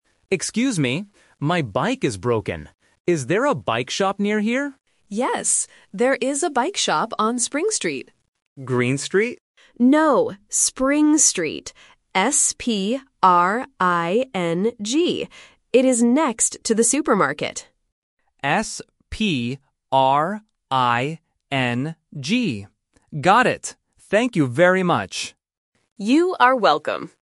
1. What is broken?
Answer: A bike

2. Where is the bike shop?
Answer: On Spring Street

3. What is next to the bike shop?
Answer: A supermarket

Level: A1